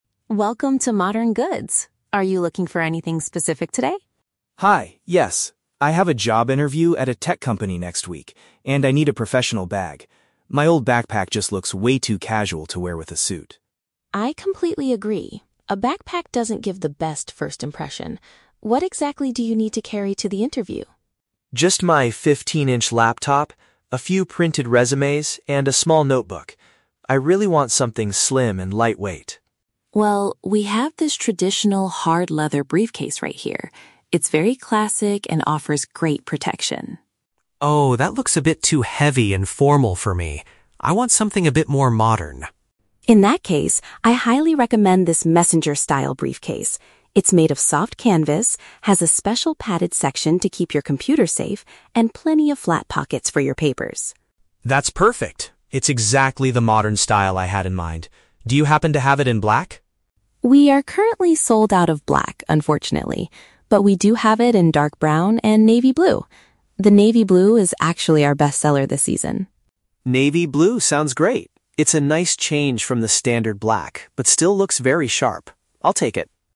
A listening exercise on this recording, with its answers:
Listen to a conversation between a customer and a shop assistant. Choose the best answer (A, B, or C) for each question.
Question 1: Why does the customer want to buy a new bag?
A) His current backpack is damaged and cannot carry his laptop.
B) He needs an appropriate accessory for a meeting with an employer.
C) He wants a heavy-duty case to travel for his tech company.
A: He needs an appropriate accessory for a meeting with an employer.

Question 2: Why does the man reject the first bag suggested by the assistant?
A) He feels it looks too old-fashioned and weighs too much.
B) It does not have enough pockets for his documents.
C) It is much more expensive than his current budget.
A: He feels it looks too old-fashioned and weighs too much.

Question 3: What color bag does the customer finally decide to purchase?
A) A standard black one.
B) A dark brown one.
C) A dark blue one.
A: A dark blue one.

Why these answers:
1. The customer says he has a "job interview" and needs a "professional bag" because his backpack looks "too casual to wear with a suit." Paraphrasing: job interview = meeting with an employer; professional bag = appropriate accessory.
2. When shown the traditional hard leather briefcase, he says it looks "a bit too heavy and formal" and he wants something "more modern." Paraphrasing: formal / not modern = old-fashioned; heavy = weighs too much.
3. The customer agrees to take the "navy blue" bag because it's a nice change from black but still looks sharp. Paraphrasing: navy blue = dark blue.

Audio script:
Assistant: Welcome to Modern Goods. Are you looking for anything specific today?
Customer: Hi, yes. I have a job interview at a tech company next week, and I need a professional bag. My old backpack just looks way too casual to wear with a suit.
Assistant: I completely agree, a backpack doesn't give the best first impression. What exactly do you need to carry to the interview?
Customer: Just my 15-inch laptop, a few printed resumes, and a small notebook. I really want something slim and lightweight.
Assistant: Well, we have this traditional hard leather briefcase right here. It's very classic and offers great protection.
Customer: Oh, that looks a bit too heavy and formal for me. I want something a bit more modern.
Assistant: In that case, I highly recommend this messenger-style briefcase. It's made of soft canvas, has a special padded section to keep your computer safe, and plenty of flat pockets for your papers.
Customer: That's perfect. It's exactly the modern style I had in mind. Do you happen to have it in black?
Assistant: We are currently sold out of black, unfortunately. But we do have it in dark brown and navy blue. The navy blue is actually our best-seller this season.
Customer: Navy blue sounds great. It's a nice change from the standard black but still looks very sharp. I'll take it.

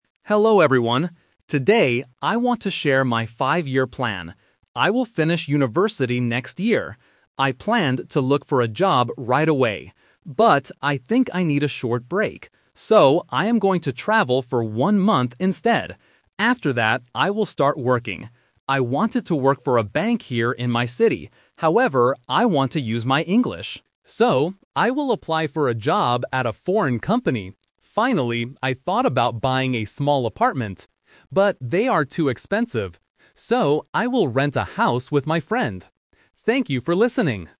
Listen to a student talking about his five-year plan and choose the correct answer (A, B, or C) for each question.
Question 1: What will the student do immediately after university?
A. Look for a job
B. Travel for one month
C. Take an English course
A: Travel for one month

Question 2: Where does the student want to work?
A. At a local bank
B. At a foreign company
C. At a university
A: At a foreign company

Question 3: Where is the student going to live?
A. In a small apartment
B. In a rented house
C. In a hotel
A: In a rented house

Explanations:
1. The student says he planned to look for a job right away (The Trap). But he changes his mind because he needs a short break. He uses "So" to state his final decision: "I am going to travel for one month instead." Taking an English course is not mentioned.
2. The student mentions that he wanted to work for a bank in his city (The Trap). However, he wants to use his English. He confirms his real plan by saying, "So, I will apply for a job at a foreign company." A university is a plausible workplace but is not mentioned.
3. The student says he thought about buying a small apartment (The Trap). But he rejects this idea because they are too expensive. His final plan is: "So, I will rent a house with my friend." A hotel is not mentioned in the audio.

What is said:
Student: Hello everyone. Today, I want to share my five-year plan. I will finish university next year. I planned to look for a job right away. But, I think I need a short break. So, I am going to travel for one month instead.
After that, I will start working. I wanted to work for a bank here in my city. However, I want to use my English. So, I will apply for a job at a foreign company.
Finally, I thought about buying a small apartment. But they are too expensive. So, I will rent a house with my friend. Thank you for listening!

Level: A2

